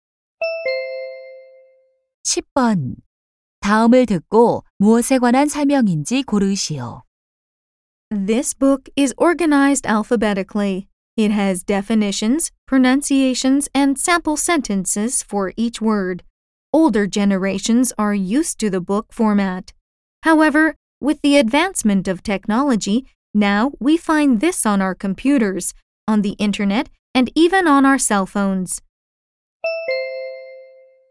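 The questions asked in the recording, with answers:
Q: 다음을 듣고 무엇에 관한 설명인지 고르시오.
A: 사전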